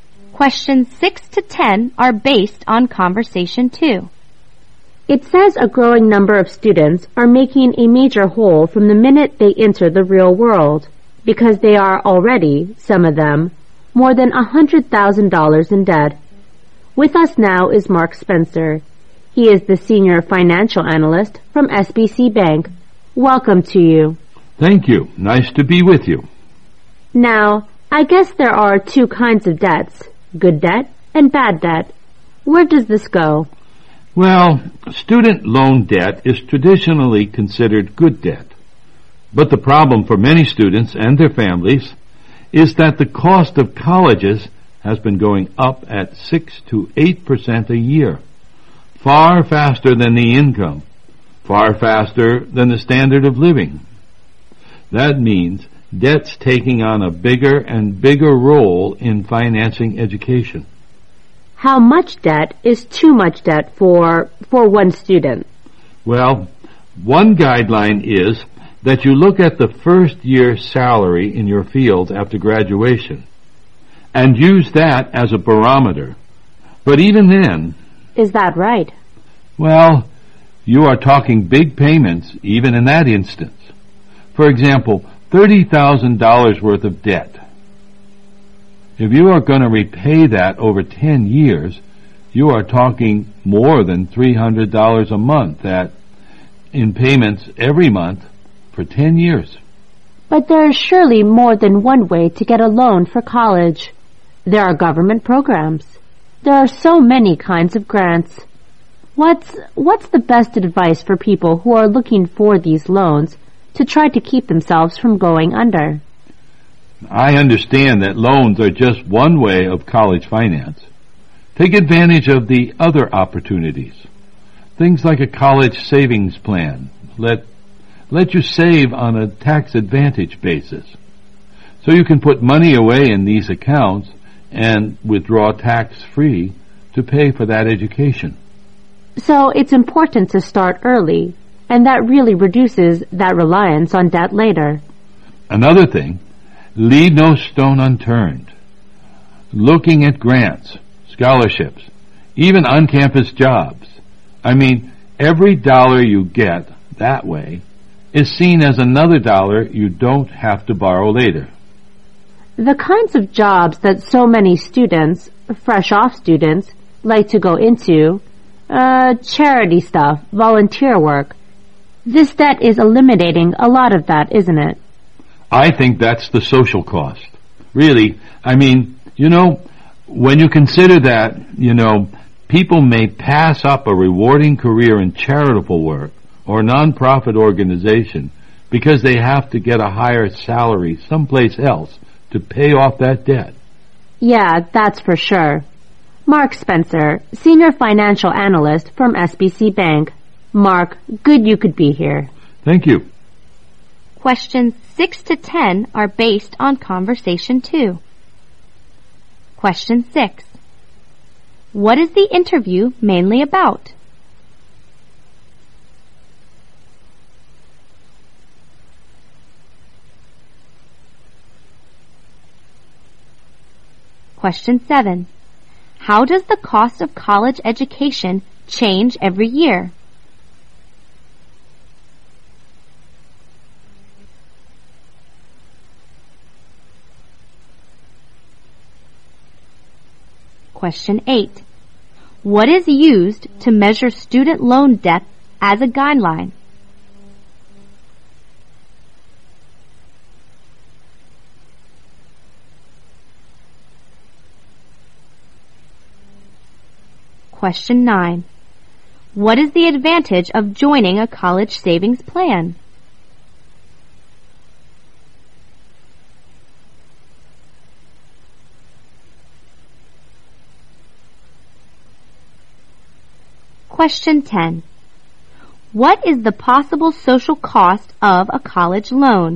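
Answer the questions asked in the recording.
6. Students' college loan debt
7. It goes up 6 to 8% a year, faster than income
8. The first-year salary in your field after graduation
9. You can save tax-advantaged and withdraw tax-free for education
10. People may pass up rewarding charity or nonprofit careers to earn more to repay debt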